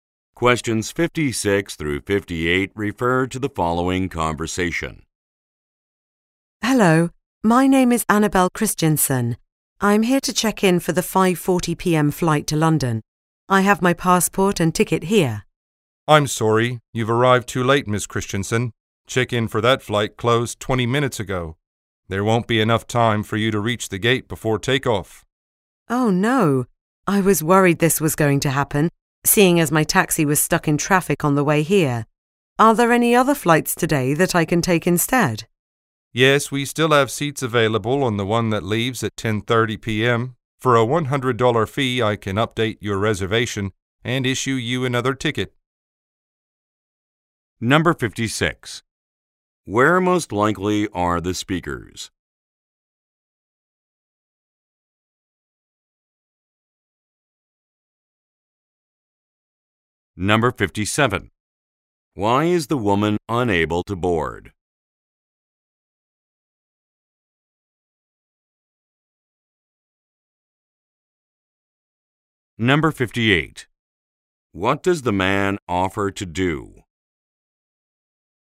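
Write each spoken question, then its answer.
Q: Where most likely are the speakers?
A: At an airport

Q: Why is the woman unable to board?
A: She arrived after check-in closed

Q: What does the man offer to do?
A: Change her reservation for a fee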